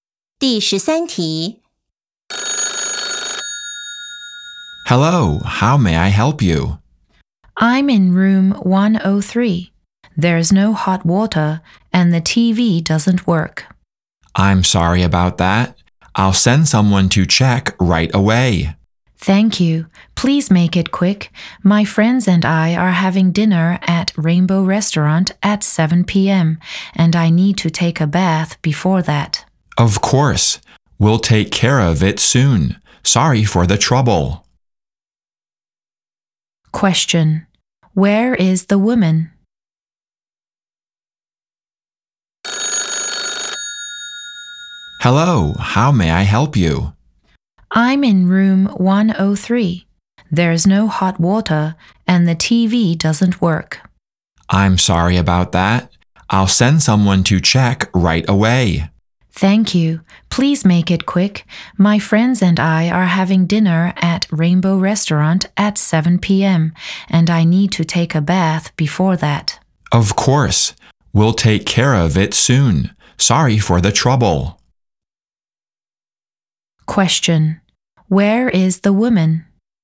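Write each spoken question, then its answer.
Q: Where is the woman?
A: At a hotel (in room 103)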